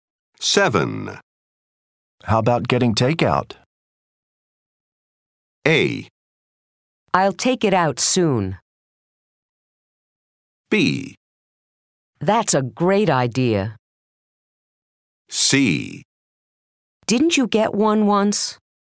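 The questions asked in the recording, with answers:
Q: How about getting takeout?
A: B: That's a great idea.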